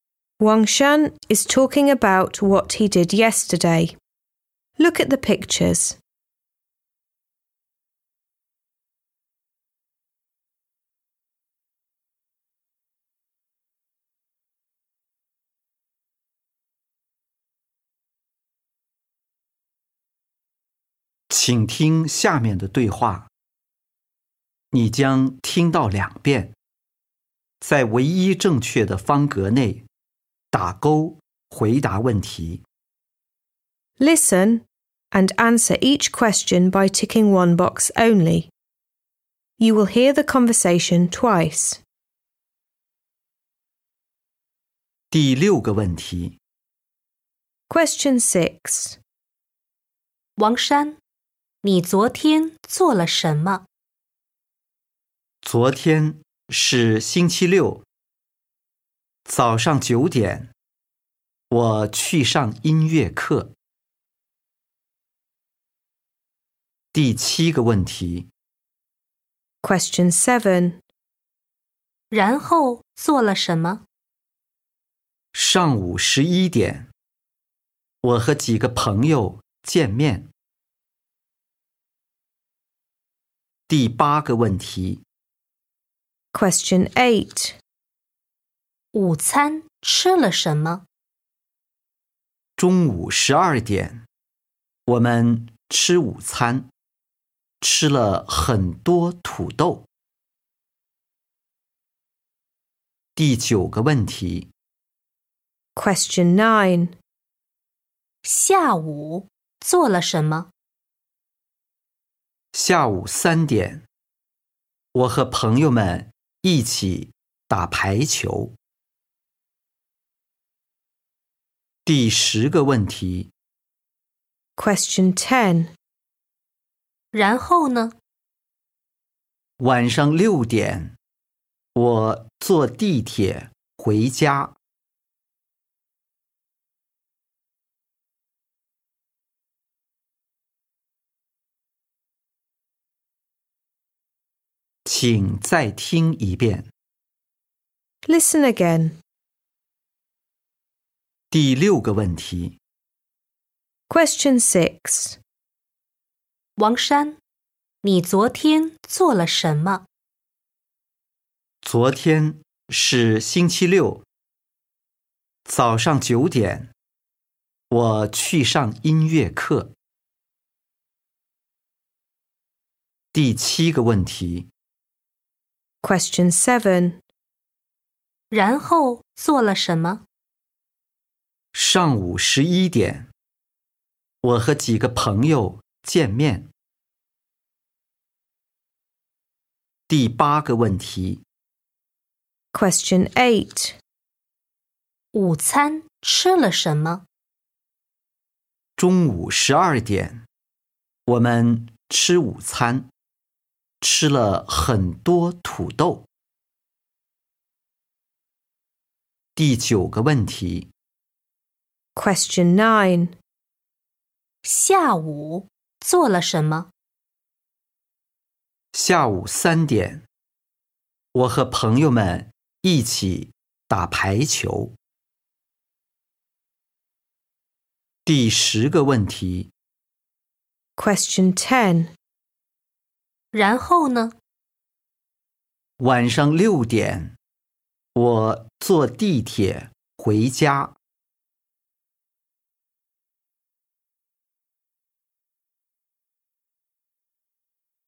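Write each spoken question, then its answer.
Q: 王山,你昨天做了什么?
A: 上音乐课

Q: 然后做了什么?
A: 和几个朋友见面

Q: 午餐吃了什么?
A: 土豆

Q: 下午做了什么?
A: 和朋友们一起打排球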